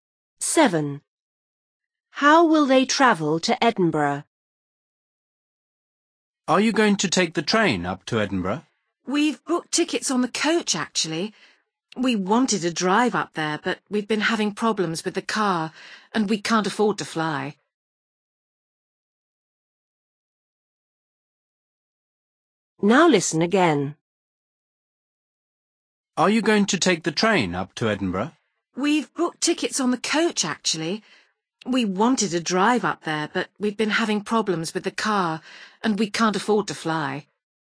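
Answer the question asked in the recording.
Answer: By coach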